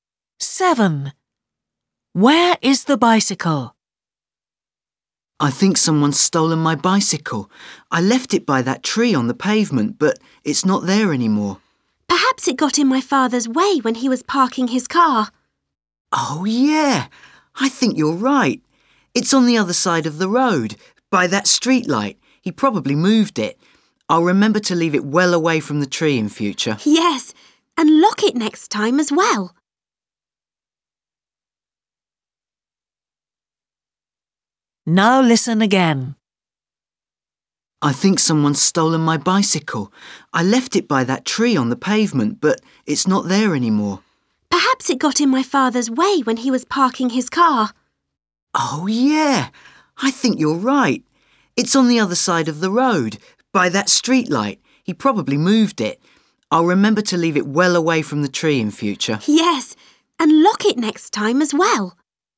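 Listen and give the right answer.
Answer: On the other side of the road, by the streetlight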